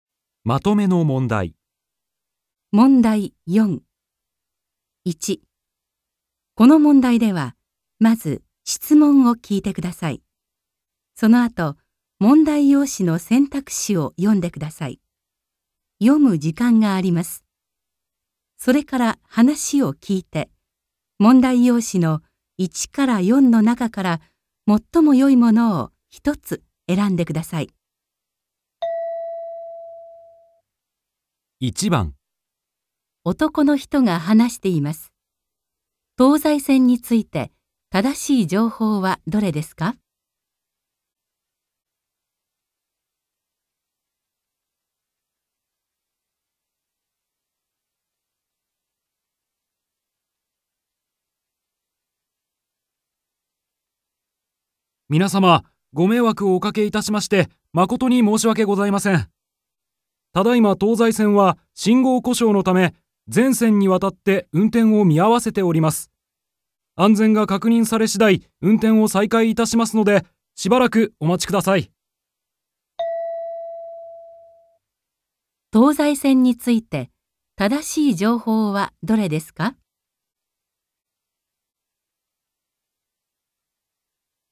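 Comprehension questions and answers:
この問題では、まず質問を聞いてください。それから話を聞いて、問題用紙の1から4の中から、最もよいものを一つえらんでください。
東西線について、 正しい情報はどれですか。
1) 地震じしん故障こしょうした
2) 今、動いていない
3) 安全が確認された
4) 運転を再開さいかいした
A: 今、動いていない

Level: N2

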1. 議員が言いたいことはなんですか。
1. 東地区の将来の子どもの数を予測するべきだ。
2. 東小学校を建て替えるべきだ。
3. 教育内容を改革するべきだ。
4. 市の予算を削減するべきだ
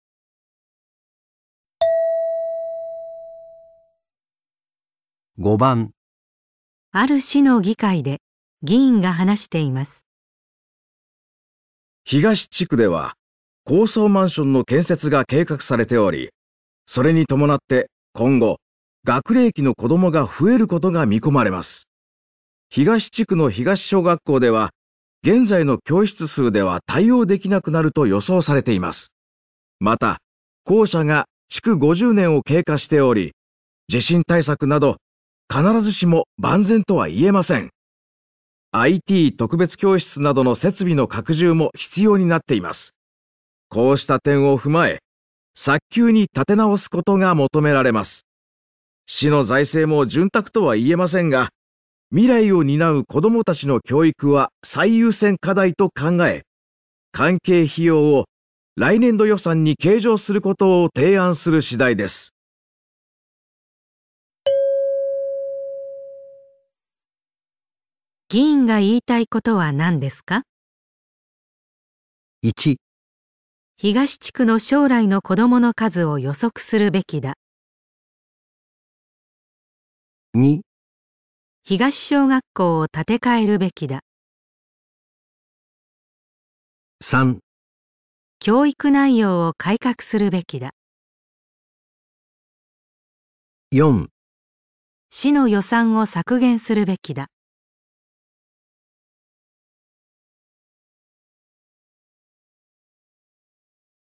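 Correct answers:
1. 東小学校を建て替えるべきだ。

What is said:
IT 特別教室などの設備の拡充も必要 になっています。こうした点を踏まえ、 早急に建て直すことが求められます。 市の財政も潤沢とは言えませんが、 未来を担う子どもたちの教育は最優先課題と考え、 会計費用を来年度予算に計上することを提案する次第 です。
問題:議員が言いたいことはなんですか。

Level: N1

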